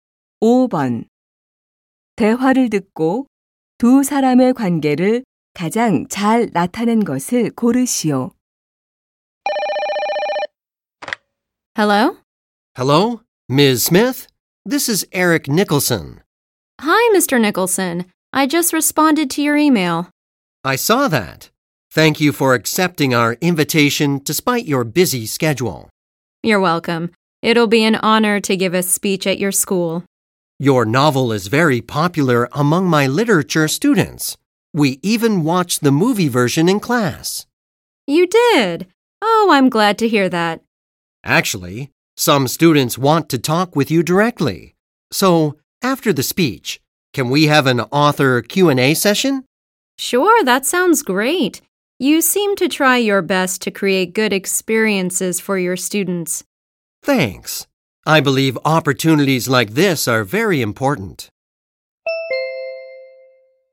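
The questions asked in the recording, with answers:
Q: 대화를 듣고 두 사람의 관계를 가장 잘 나타낸 것을 고르시오.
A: 교사 - 소설가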